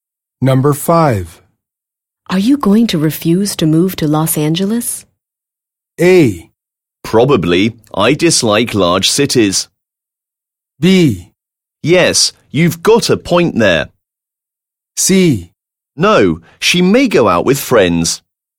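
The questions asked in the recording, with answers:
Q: Are you going to refuse to move to Los Angeles?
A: A: Probably. I dislike large cities.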